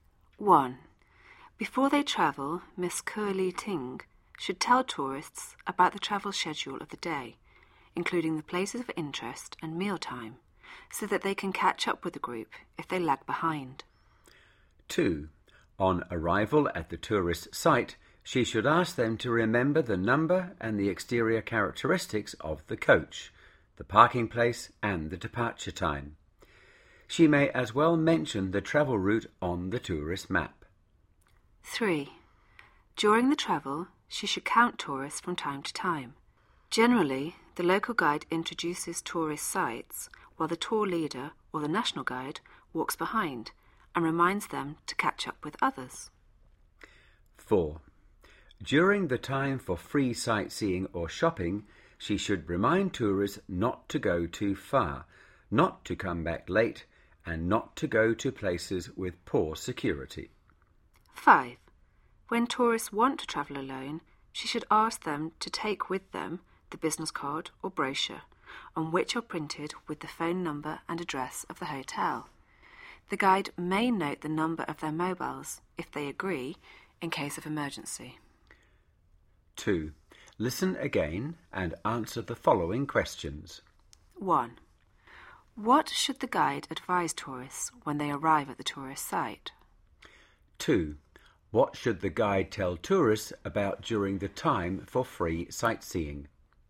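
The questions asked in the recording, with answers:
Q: What should the guide advise tourists when they arrive at the tourist site?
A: To remember the number and exterior of the coach, the parking place and the departure time

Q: What should the guide tell tourists about during the time for free sightseeing?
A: Not to go too far, not to come back late, and not to go to places with poor security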